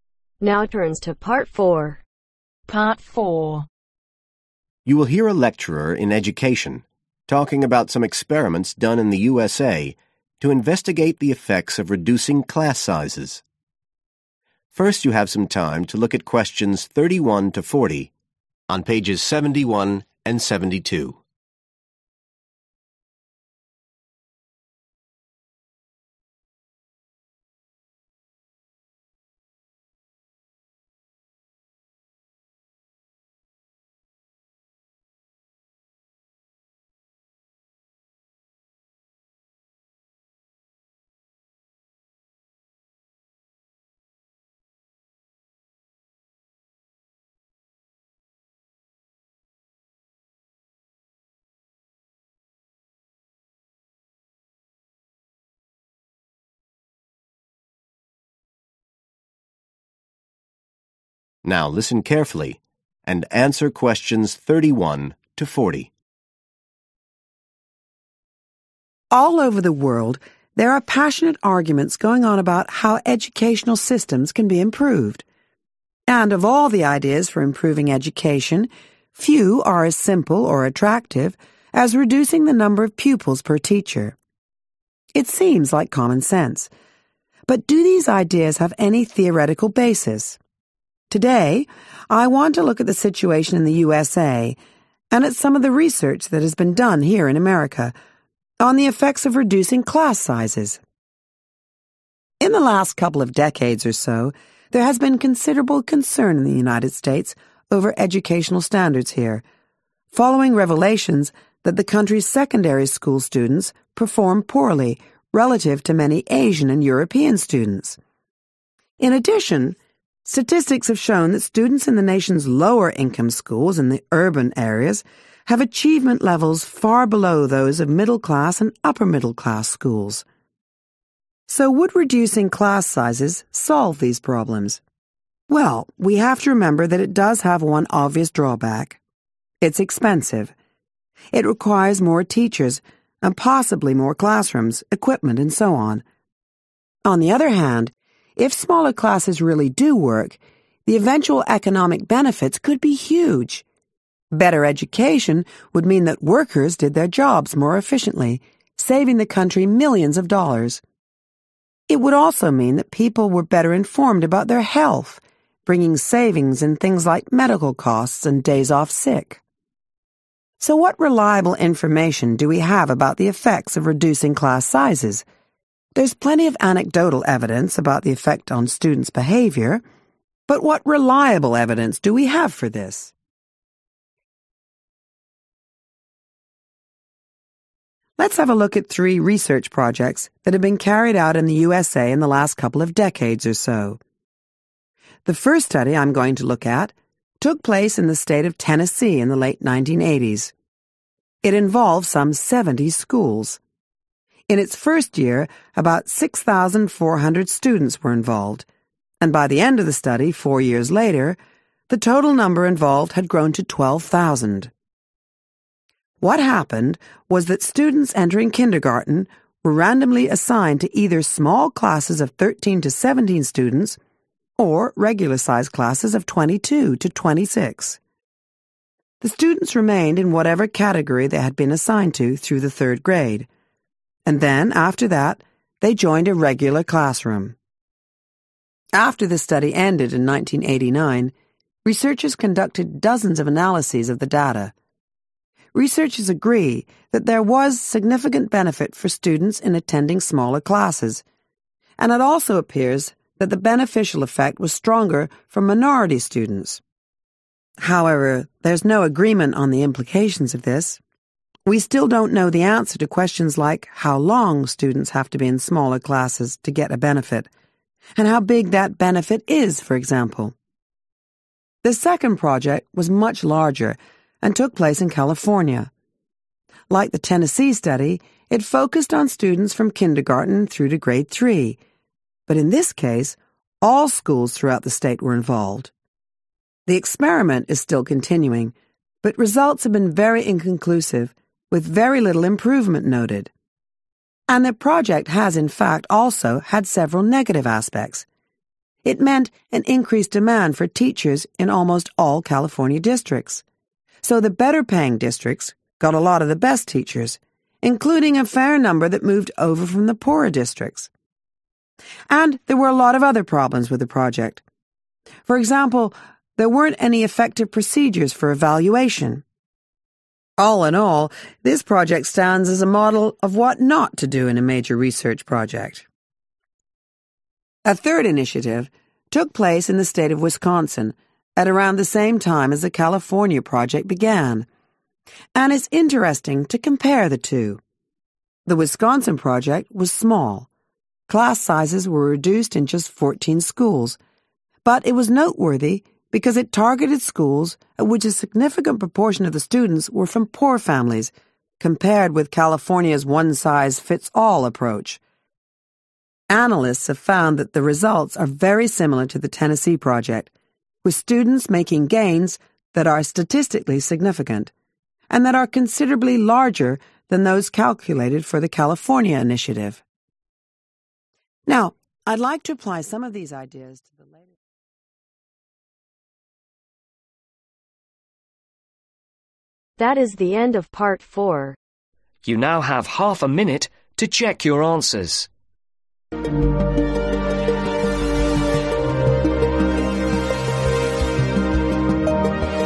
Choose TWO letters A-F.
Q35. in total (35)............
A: 12000

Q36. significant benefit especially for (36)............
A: Minority

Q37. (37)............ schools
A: All

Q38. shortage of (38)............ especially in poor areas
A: Teachers

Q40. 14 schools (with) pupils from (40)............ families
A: Poor